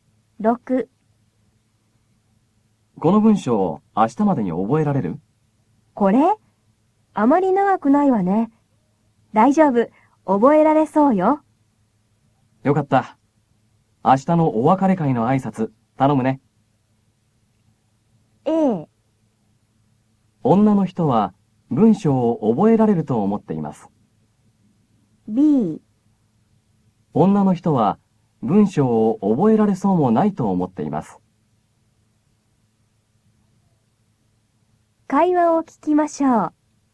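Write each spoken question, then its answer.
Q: A。女の人は、文章を覚えられると思っています。B女の人は文章を覚えられそうもないと思っています。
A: A: 女の人は、文章を覚えられると思っています。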